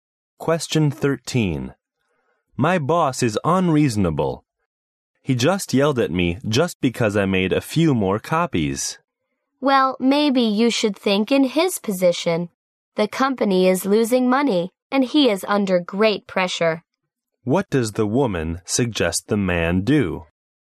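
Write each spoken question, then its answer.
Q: What does the woman suggest the man do?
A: Think about things from his boss's position.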